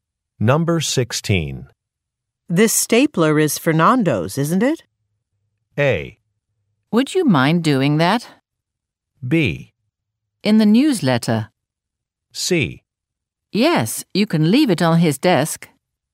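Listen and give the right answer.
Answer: C: Yes, you can leave it on his desk.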